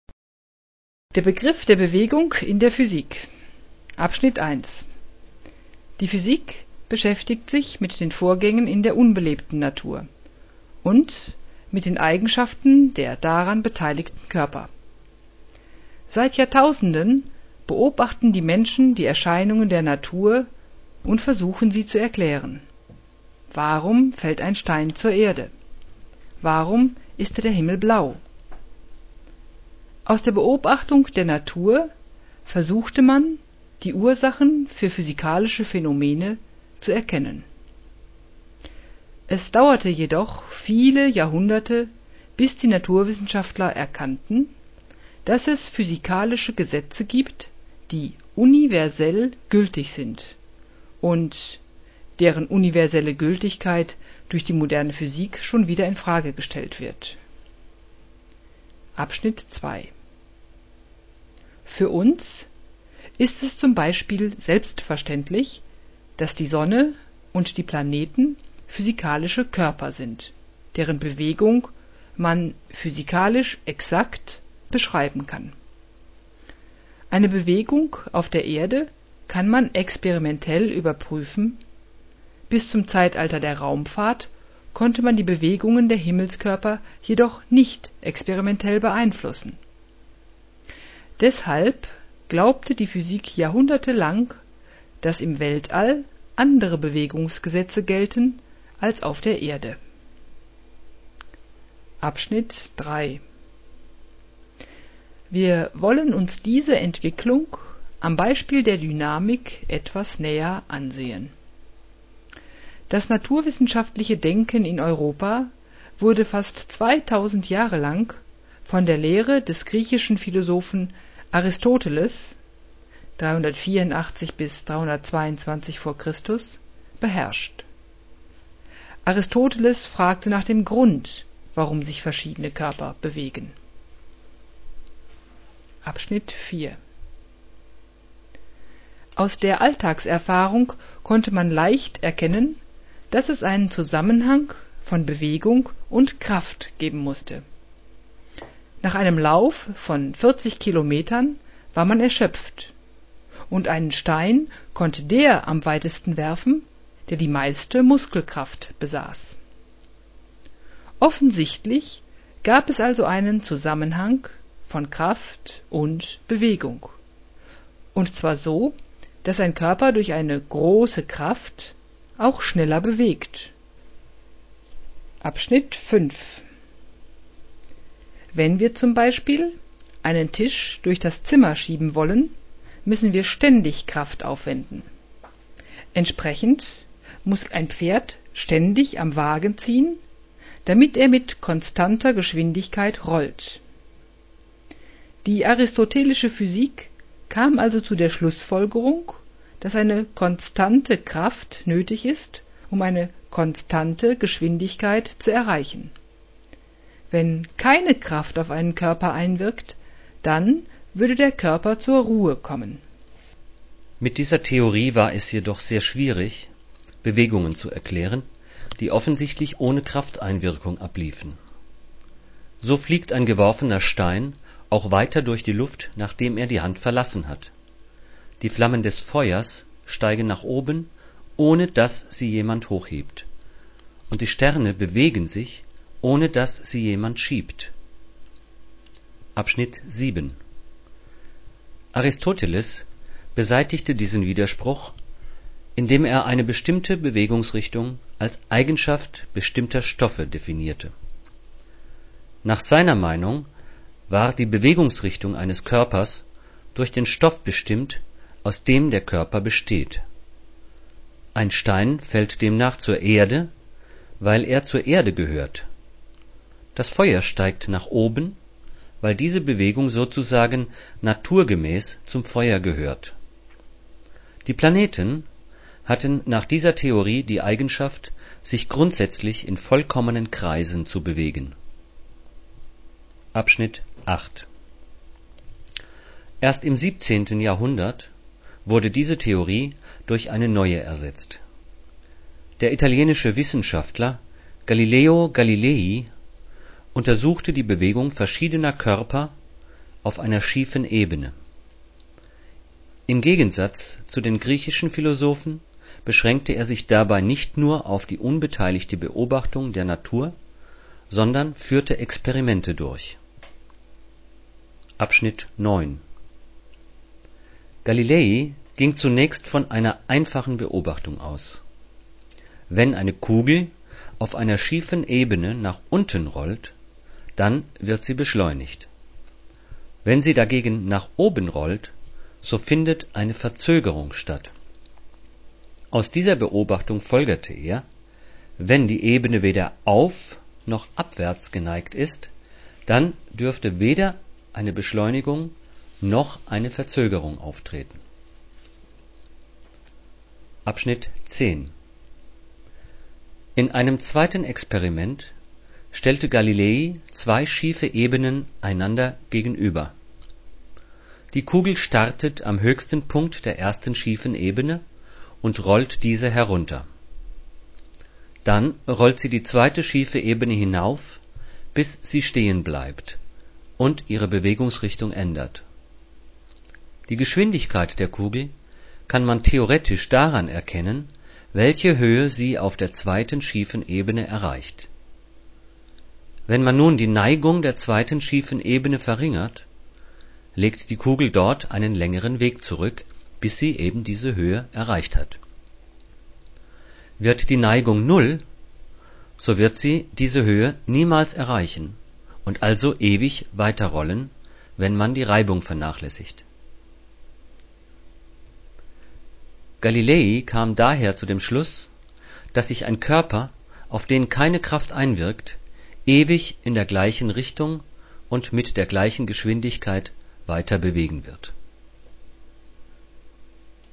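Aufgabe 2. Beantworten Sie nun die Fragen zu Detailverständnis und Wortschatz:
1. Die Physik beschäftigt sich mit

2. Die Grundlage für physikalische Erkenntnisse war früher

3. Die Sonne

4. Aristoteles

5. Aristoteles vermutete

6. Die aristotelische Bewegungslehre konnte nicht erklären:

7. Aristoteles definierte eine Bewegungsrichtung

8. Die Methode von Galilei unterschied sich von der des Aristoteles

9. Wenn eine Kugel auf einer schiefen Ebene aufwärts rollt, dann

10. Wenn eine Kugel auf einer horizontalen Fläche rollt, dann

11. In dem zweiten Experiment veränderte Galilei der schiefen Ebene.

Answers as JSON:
{"1": "den Vorgängen in der unbelebten Natur und den Eigenschaften der beteiligten Körper", "2": "die Beobachtung der Natur", "3": "ist ein physikalischer Körper, dessen Bewegung man exakt beschreiben kann", "4": "fragte nach dem Grund, warum sich Körper bewegen", "5": "dass eine konstante Kraft für eine konstante Geschwindigkeit nötig ist", "6": "Bewegungen ohne Krafteinwirkung, z. 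B. einen geworfenen Stein, aufsteigende Flammen, die Sterne", "7": "als Eigenschaft bestimmter Stoffe", "8": "dadurch, dass er Experimente durchführte", "9": "findet eine Verzögerung statt", "10": "tritt weder Beschleunigung noch Verzögerung auf", "11": "die Neigung"}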